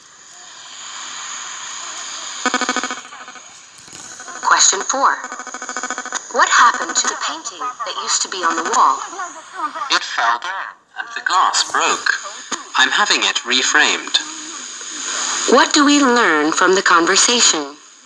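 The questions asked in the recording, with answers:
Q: What do we learn from the conversation?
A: The painting fell and broke, and is being reframed.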